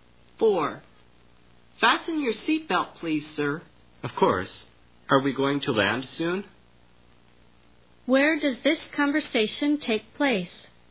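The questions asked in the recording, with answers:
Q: Where does this conversation take place?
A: On a plane.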